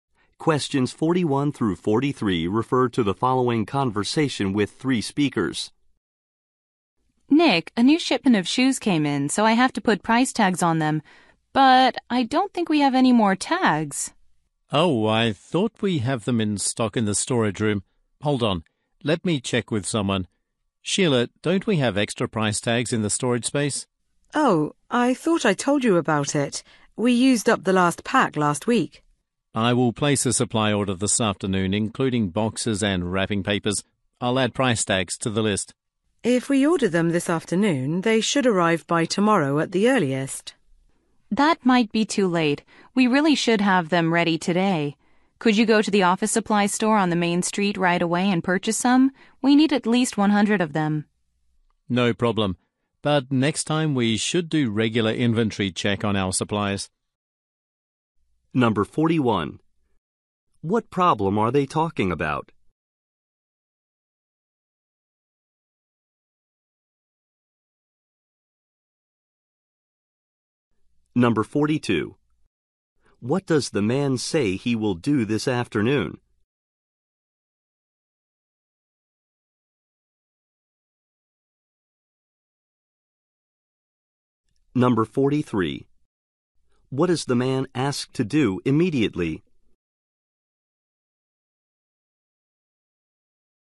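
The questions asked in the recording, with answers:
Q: What problem are they talking about?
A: They have run out of price tags

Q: What is the man asked to do immediately?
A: Buy price tags at the office supply store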